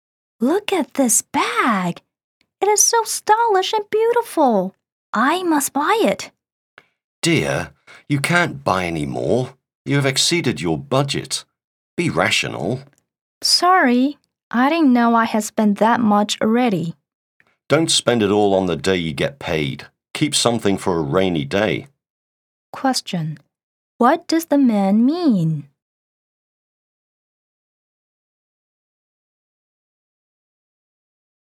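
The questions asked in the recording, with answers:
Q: What does the man mean?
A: She has spent over her budget, so she shouldn't buy the bag and should save money for the future.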